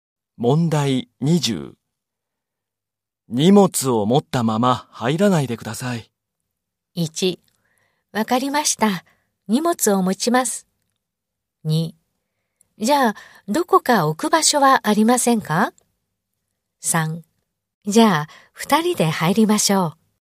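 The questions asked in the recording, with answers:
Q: 荷物を持ったまま入らないでください。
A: 2: じゃあ、どこか置く場所はありませんか?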